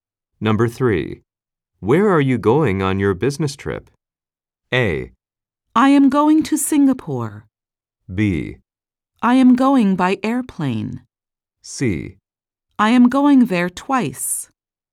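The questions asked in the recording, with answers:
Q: Where are you going on your business trip?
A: A: I am going to Singapore.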